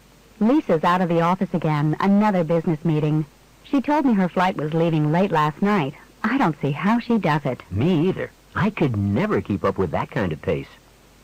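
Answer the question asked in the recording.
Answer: Lisa travels very often for business, and the speakers are impressed by her pace.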